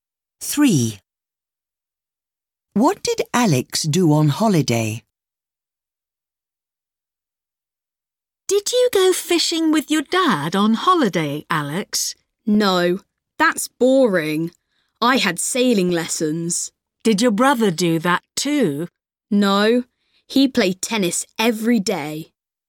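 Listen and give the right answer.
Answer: He had sailing lessons.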